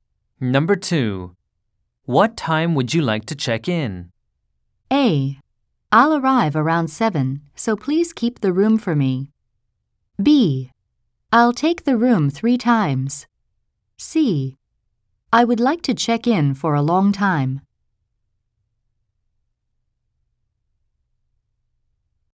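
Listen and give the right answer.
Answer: A: I'll arrive around 7, so please keep the room for me.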